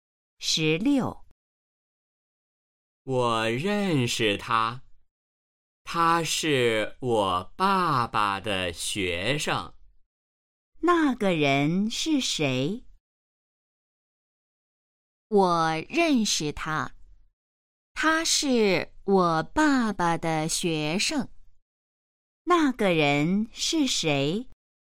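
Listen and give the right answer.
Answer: 他爸爸的学生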